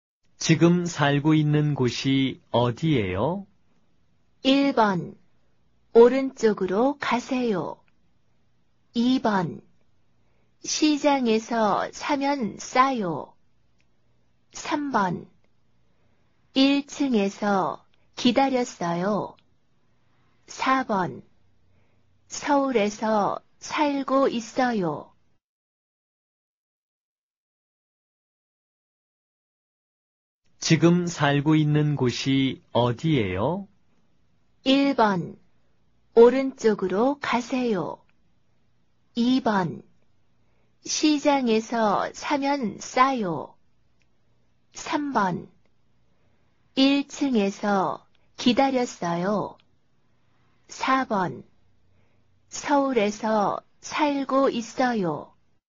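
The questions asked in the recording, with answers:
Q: 지금 살고 있는 곳이 어디예요?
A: 4: 서울에서 살고 있어요.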